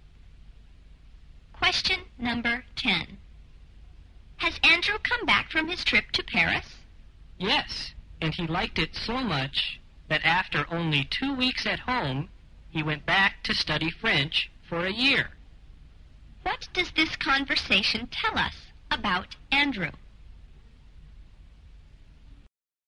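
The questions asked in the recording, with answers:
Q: What does this conversation tell us about Andrew?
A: He went back to Paris to study French for a year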